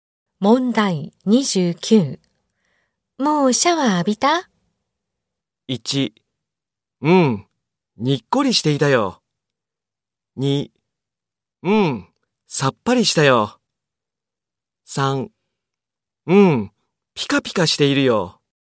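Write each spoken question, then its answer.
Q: もうシャワー浴びた?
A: 2: うん、さっぱりしたよ。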